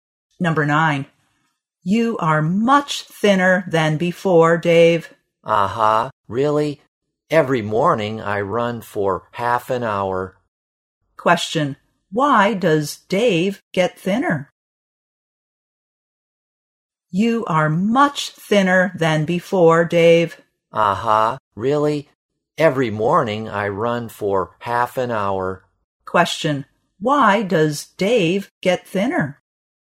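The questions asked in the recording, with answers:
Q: Why does Dave get thinner?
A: He runs every morning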